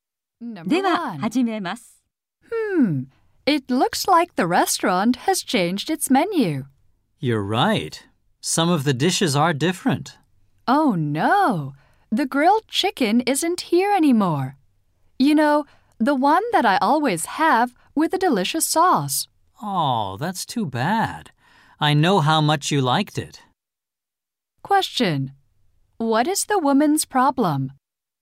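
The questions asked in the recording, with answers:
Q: What is the woman's problem?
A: The grilled chicken she always orders is no longer on the menu.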